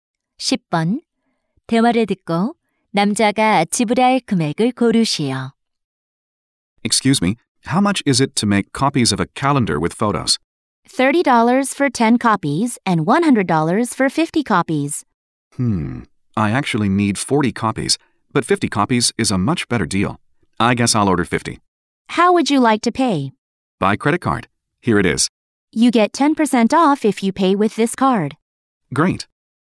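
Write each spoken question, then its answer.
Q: 대화를 듣고 남자가 지불할 금액을 고르시오.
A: 90달러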